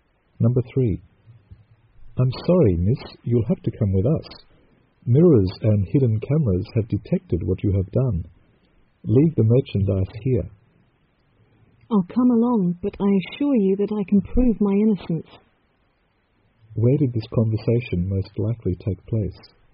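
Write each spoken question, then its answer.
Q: Where did this conversation most likely take place?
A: In a store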